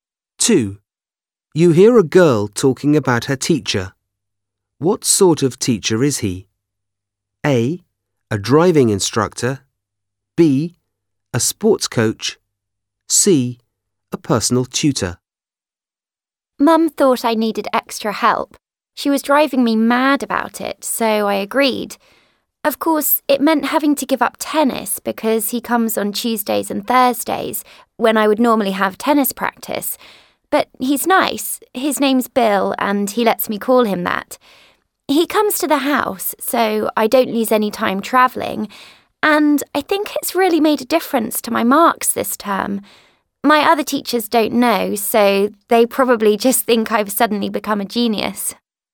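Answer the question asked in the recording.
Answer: C: A personal tutor.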